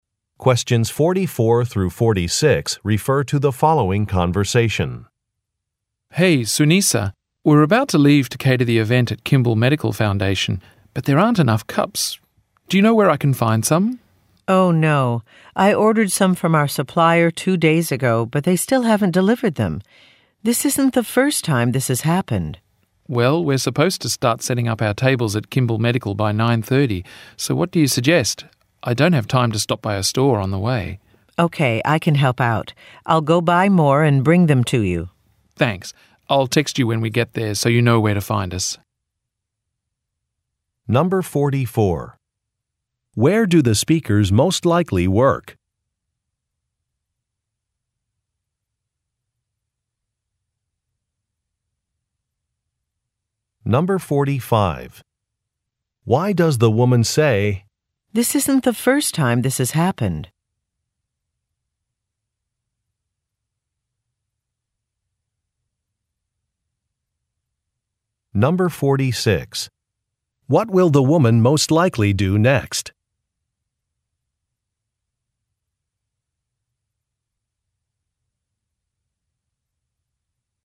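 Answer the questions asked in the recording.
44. At a catering company
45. To complain that the supplier has been late with deliveries before
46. Buy more cups and bring them to the man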